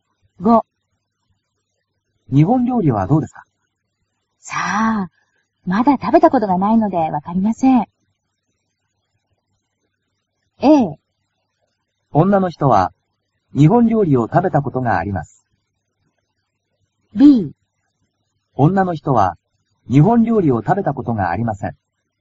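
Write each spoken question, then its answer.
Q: 女の人は、日本料理を食べたことがあります。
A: B: 女の人は、日本料理を食べたことがありません。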